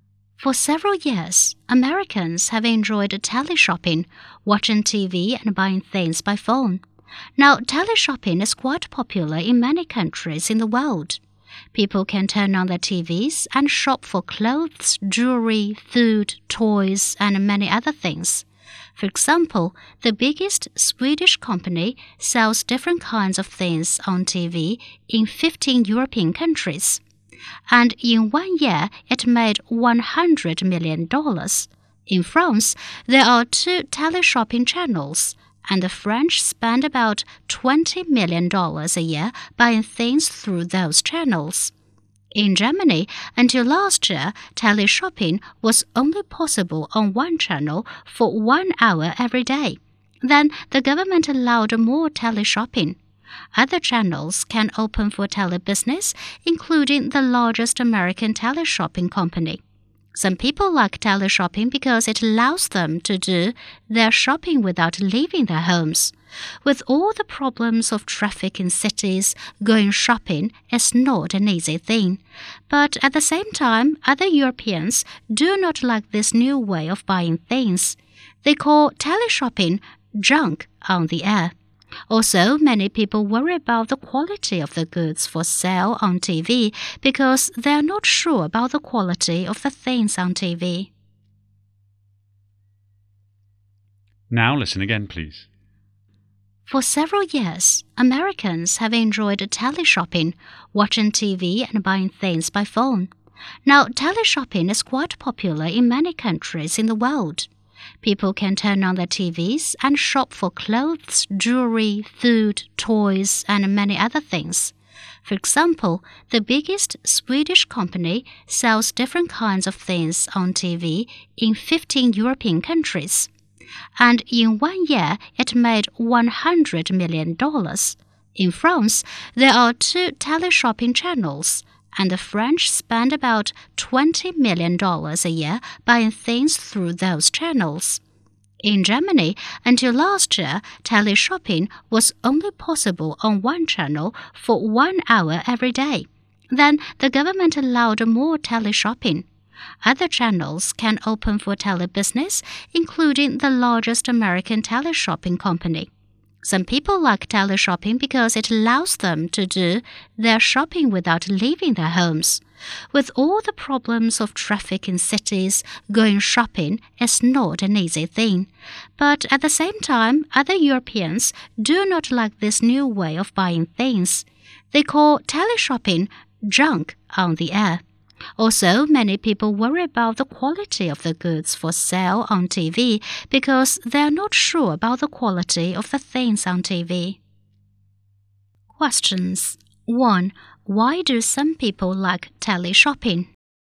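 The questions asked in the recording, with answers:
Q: Why do some people like teleshopping?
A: Because it allows them to shop without leaving their homes, and going shopping is not easy with city traffic problems.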